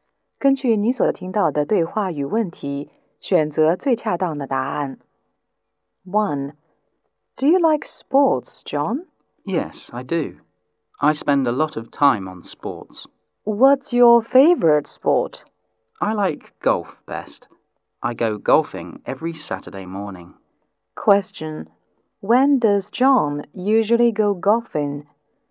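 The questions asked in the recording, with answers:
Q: When does John usually go golfing?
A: Every Saturday morning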